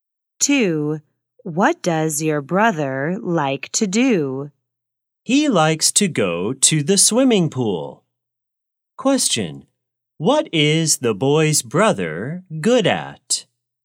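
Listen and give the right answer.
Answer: Swimming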